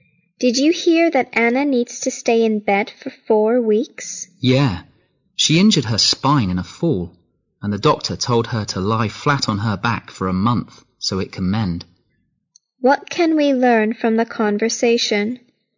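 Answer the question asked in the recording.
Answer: Anna hurt her spine in a fall and has to lie flat in bed for a month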